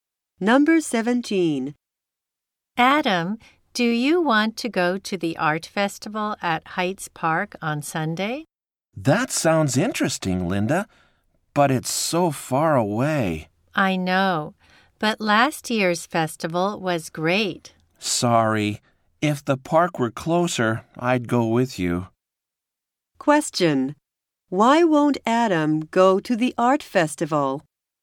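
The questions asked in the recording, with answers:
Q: Why won't Adam go to the art festival?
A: The park is too far away.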